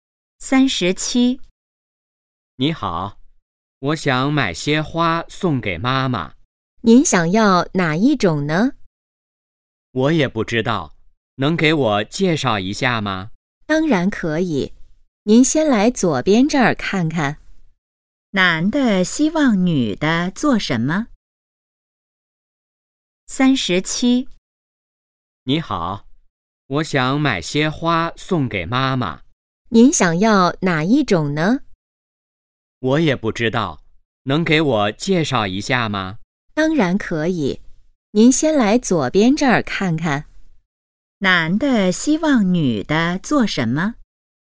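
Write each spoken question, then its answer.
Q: 男的希望女的做什么?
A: 给他介绍一下花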